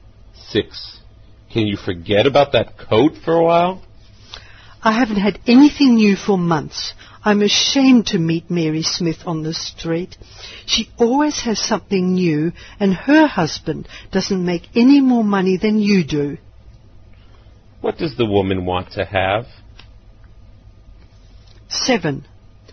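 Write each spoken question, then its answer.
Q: What does the woman want to have?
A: A new coat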